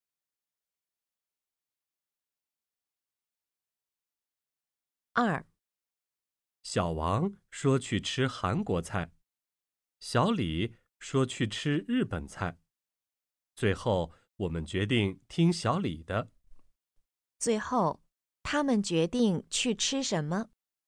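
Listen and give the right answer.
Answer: 日本菜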